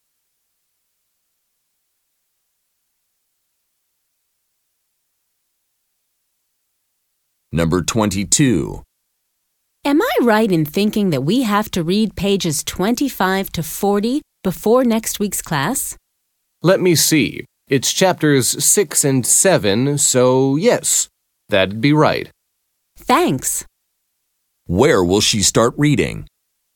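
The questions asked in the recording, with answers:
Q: Where will she start reading?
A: Page 25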